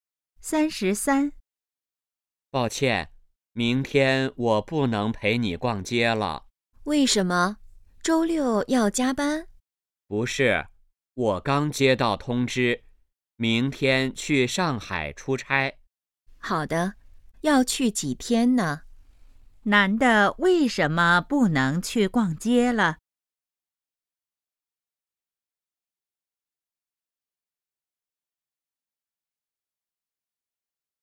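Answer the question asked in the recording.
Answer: 要去上海出差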